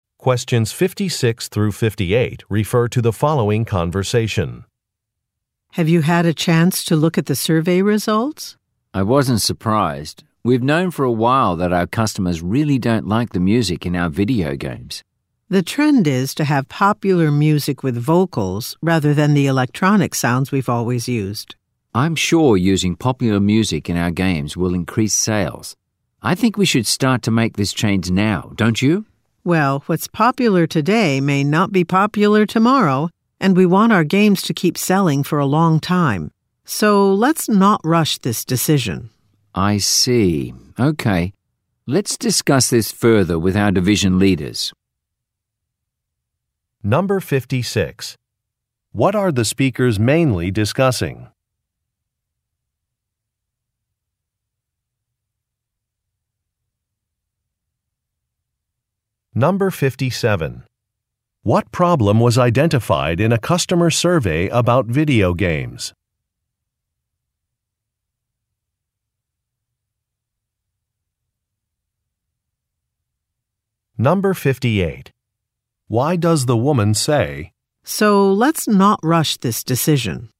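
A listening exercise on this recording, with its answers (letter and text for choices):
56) What are the speakers mainly discussing?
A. A musician who has become successful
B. A company decision to stop offering a service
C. A licensing agreement with a popular singer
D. A possible change to a product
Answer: D. A possible change to a product

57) What problem was identified in a customer survey about video games?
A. Some video games are too difficult.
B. Customers do not like the music.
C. Some games only work with expensive equipment.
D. Some games are completely defective.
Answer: B. Customers do not like the music.

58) Why does the woman say, "So, let's not rush this decision"?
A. To request more funding from the division leaders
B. To reject the man's suggestion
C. To obtain a replacement product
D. To recommend a different musician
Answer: B. To reject the man's suggestion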